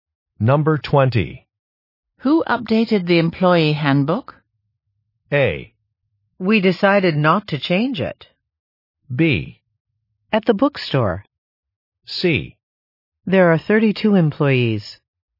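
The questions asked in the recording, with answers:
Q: Who updated the employee handbook?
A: A: We decided not to change it.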